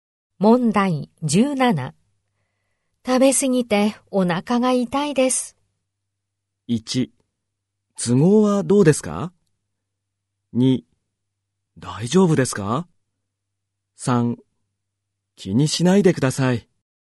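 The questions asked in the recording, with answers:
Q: 食べ過ぎてお腹が痛いです。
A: 2: 大丈夫ですか?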